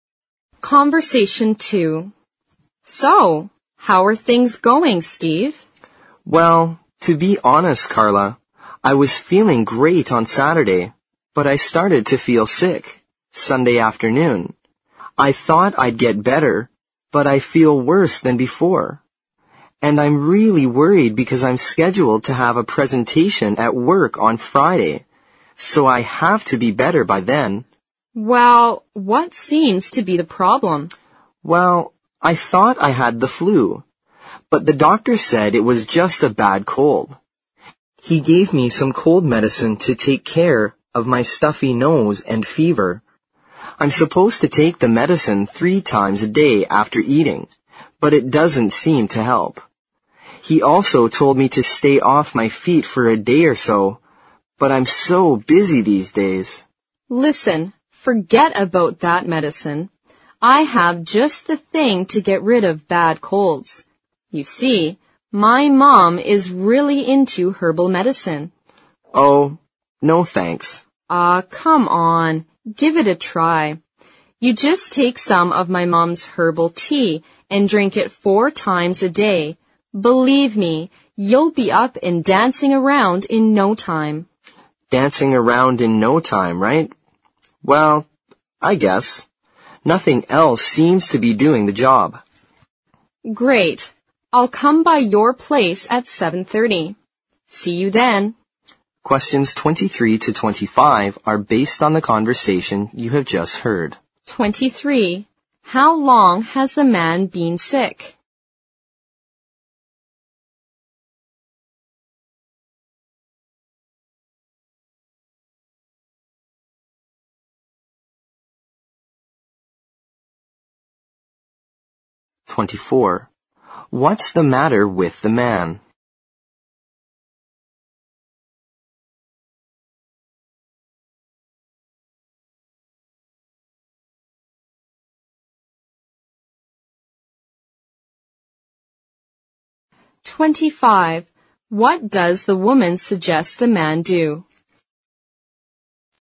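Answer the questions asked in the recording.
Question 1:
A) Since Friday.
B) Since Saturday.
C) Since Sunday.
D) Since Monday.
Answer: C) Since Sunday.
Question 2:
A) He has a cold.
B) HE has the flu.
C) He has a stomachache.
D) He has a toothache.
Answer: A) He has a cold.
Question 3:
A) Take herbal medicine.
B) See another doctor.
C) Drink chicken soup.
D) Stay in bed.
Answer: A) Take herbal medicine.

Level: 四级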